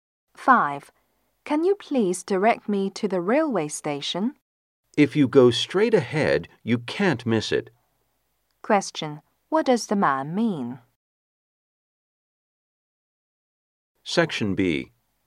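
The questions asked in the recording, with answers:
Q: What does the man mean?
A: The station is straight ahead and easy to find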